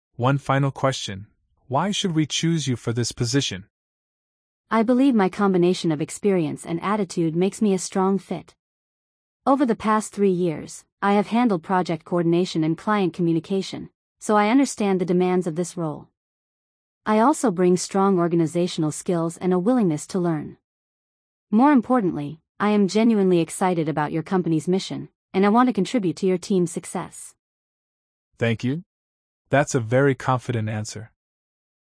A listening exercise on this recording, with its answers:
Complete the phrases as you listen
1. One final question: Why should we ______ you for this position?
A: choose

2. I believe my combination of ______ and attitude makes me a strong fit.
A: experience

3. Over the past three years, I have handled project coordination and client ______.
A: communication

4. I also bring strong organizational skills and a willingness to ______.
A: learn

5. More importantly, I am genuinely excited about your company's ______.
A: mission

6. I want to contribute to your team's ______.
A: success

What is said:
Interviewer: One final question: Why should we choose you for this position?
Candidate: I believe my combination of experience and attitude makes me a strong fit. Over the past three years, I have handled project coordination and client communication, so I understand the demands of this role. I also bring strong organizational skills and a willingness to learn. More importantly, I am genuinely excited about your company's mission, and I want to contribute to your team's success.
Perfect! "I want to contribute to your team's success."